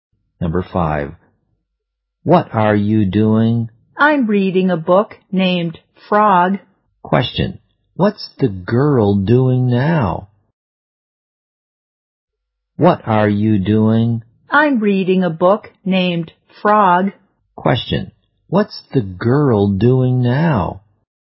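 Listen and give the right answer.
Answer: Reading a book named Frog.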